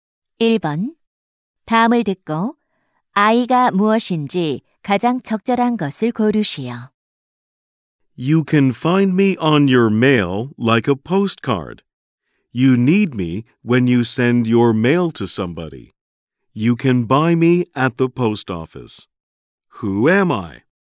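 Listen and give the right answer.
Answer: 우표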